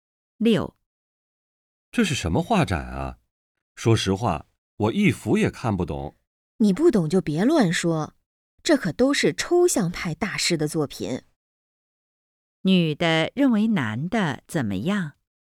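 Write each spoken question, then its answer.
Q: 女的认为男的怎么样?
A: 不懂抽象艺术,不该乱说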